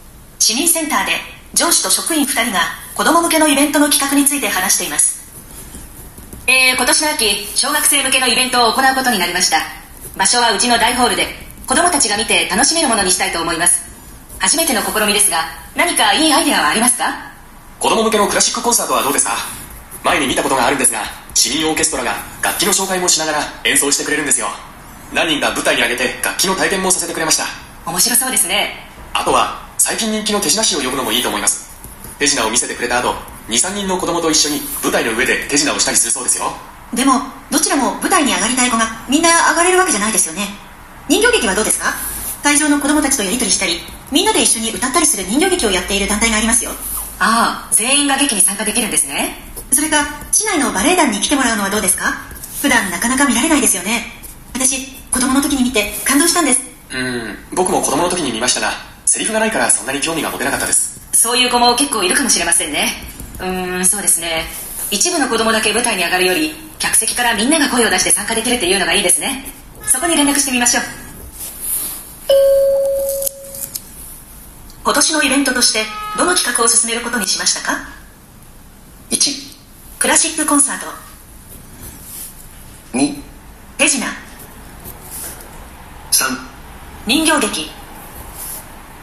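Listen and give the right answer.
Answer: 3: 人形劇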